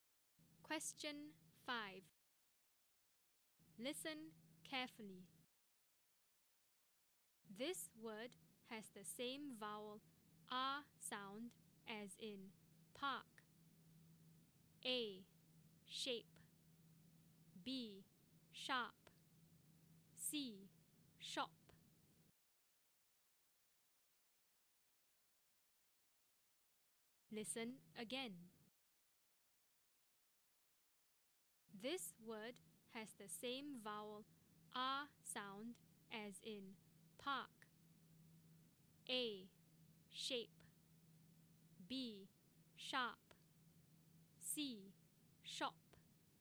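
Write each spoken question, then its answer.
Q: This word has the same vowel R sound as in park.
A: B: Sharp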